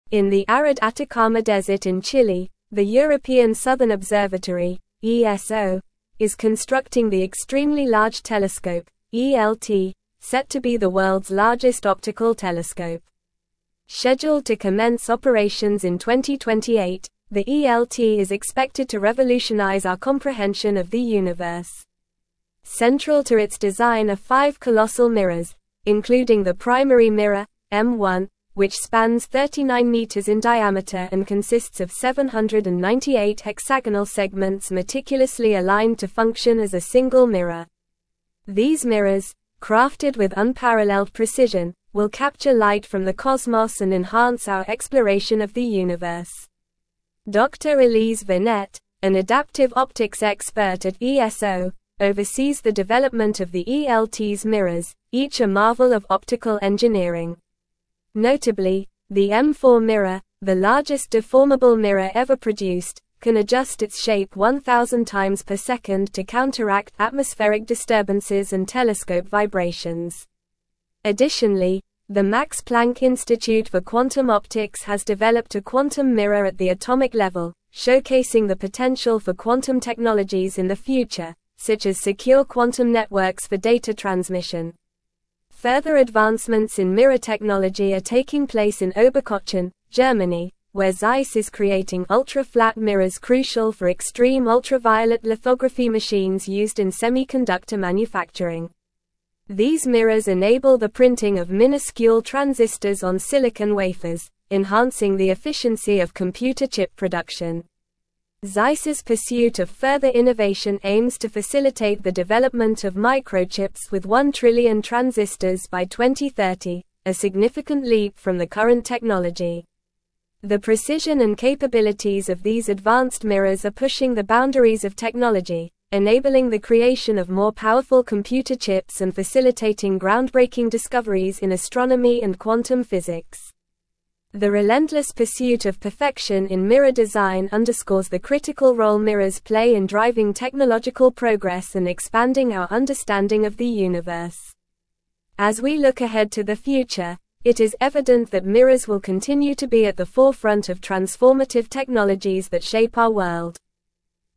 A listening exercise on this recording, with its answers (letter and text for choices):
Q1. set to be the world's largest (1)______ telescope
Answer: optical

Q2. Central to its design are five (2)______ (3)______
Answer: colossal

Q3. Central to its design are five (2)______ (3)______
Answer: mirrors

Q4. including the primary (4)______, M1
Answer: mirror

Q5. enhance our (5)______ of the universe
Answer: exploration

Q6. counteract atmospheric disturbances and telescope (6)______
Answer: vibrations

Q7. the Max Planck Institute for Quantum (7)______ has developed a (8)______ mirror at the atomic level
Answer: Optics

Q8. crucial for (9)______ ultraviolet lithography machines used in (10)______ manufacturing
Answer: extreme

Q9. crucial for (9)______ ultraviolet lithography machines used in (10)______ manufacturing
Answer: semiconductor

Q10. These mirrors enable the printing of minuscule (11)______ on silicon wafers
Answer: transistors

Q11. Zeiss's pursuit of further (12)______ aims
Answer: innovation

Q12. The precision and (13)______ of these advanced mirrors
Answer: capabilities

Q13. (14)______ the creation of more powerful computer chips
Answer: enabling

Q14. As we look ahead to the (15)______, it is evident that mirrors will (16)______ to be at the forefront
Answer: future

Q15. As we look ahead to the (15)______, it is evident that mirrors will (16)______ to be at the forefront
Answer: continue

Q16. What is the primary mirror of the Extremely Large Telescope (ELT) made up of?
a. 500 circular segments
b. 1000 triangular segments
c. 798 hexagonal segments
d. 200 square segments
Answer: c. 798 hexagonal segments

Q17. When is the ELT scheduled to commence operations?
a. 2028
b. 2035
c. 2040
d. 2025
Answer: a. 2028

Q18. Who oversees the development of the ELT's mirrors?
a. Dr. John Smith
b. Dr. Maria Garcia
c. Dr. Elise Vernet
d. Dr. David Lee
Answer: c. Dr. Elise Vernet

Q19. What is the M4 mirror capable of doing to counteract disturbances?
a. Rotate 360 degrees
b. Change its color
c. Expand its size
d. Adjust its shape 1,000 times per second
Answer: d. Adjust its shape 1,000 times per second

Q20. Where is Zeiss creating ultra-flat mirrors for extreme ultraviolet lithography machines?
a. Paris, France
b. Tokyo, Japan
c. New York, USA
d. Oberkochen, Germany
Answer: d. Oberkochen, Germany

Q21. What is the goal of Zeiss in developing microchips by 2030?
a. One billion transistors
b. One trillion transistors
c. One million transistors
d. One hundred thousand transistors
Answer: b. One trillion transistors

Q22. What is the potential application of the quantum mirror developed by the Max Planck Institute for Quantum Optics?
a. Secure quantum networks for data transmission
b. Secure quantum networks for energy production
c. Secure quantum networks for transportation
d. Secure quantum networks for agriculture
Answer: a. Secure quantum networks for data transmission

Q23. What role do mirrors play in driving technological progress and expanding our understanding of the universe?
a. Minor role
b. Critical role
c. Insignificant role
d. Supportive role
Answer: b. Critical role

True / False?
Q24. Dr. Elise Vernet, an adaptive optics expert at NASA, is overseeing the development of the ELT's mirrors.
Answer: False

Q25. The ELT is expected to begin operations in 2030 and is anticipated to revolutionize our understanding of the solar system.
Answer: False

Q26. The primary mirror of the ELT, M1, is made up of 799 hexagonal segments meticulously aligned to function as a single mirror.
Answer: False

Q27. The Extremely Large Telescope (ELT) being constructed in the Atacama desert in Chile is set to be the world's largest optical telescope.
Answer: True

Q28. Zeiss aims to develop microchips with one trillion transistors by 2030, which would be a significant advancement from current technology.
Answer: True

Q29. Schott in Jena, Germany, is creating curved mirrors crucial for extreme ultraviolet lithography machines used in semiconductor manufacturing.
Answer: False

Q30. How many hexagonal segments make up the primary mirror, M1, of the ELT?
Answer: The primary mirror, M1, of the ELT consists of 798 hexagonal segments.

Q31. What is the ambitious goal set by Zeiss for the development of microchips by 2030?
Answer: Zeiss aims to facilitate the development of microchips with one trillion transistors by 2030, a significant leap from current technology.

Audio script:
In the arid Atacama desert in Chile, the European Southern Observatory (ESO) is constructing the Extremely Large Telescope (ELT), set to be the world's largest optical telescope. Scheduled to commence operations in 2028, the ELT is expected to revolutionize our comprehension of the universe. Central to its design are five colossal mirrors, including the primary mirror, M1, which spans 39 meters in diameter and consists of 798 hexagonal segments meticulously aligned to function as a single mirror. These mirrors, crafted with unparalleled precision, will capture light from the cosmos and enhance our exploration of the universe.
Dr. Elise Vernet, an adaptive optics expert at ESO, oversees the development of the ELT's mirrors, each a marvel of optical engineering. Notably, the M4 mirror, the largest deformable mirror ever produced, can adjust its shape 1,000 times per second to counteract atmospheric disturbances and telescope vibrations. Additionally, the Max Planck Institute for Quantum Optics has developed a quantum mirror at the atomic level, showcasing the potential for quantum technologies in the future, such as secure quantum networks for data transmission.
Further advancements in mirror technology are taking place in Oberkochen, Germany, where Zeiss is creating ultra-flat mirrors crucial for extreme ultraviolet lithography machines used in semiconductor manufacturing. These mirrors enable the printing of minuscule transistors on silicon wafers, enhancing the efficiency of computer chip production. Zeiss's pursuit of further innovation aims to facilitate the development of microchips with one trillion transistors by 2030, a significant leap from the current technology.
The precision and capabilities of these advanced mirrors are pushing the boundaries of technology, enabling the creation of more powerful computer chips and facilitating groundbreaking discoveries in astronomy and quantum physics. The relentless pursuit of perfection in mirror design underscores the critical role mirrors play in driving technological progress and expanding our understanding of the universe. As we look ahead to the future, it is evident that mirrors will continue to be at the forefront of transformative technologies that shape our world.

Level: Level 4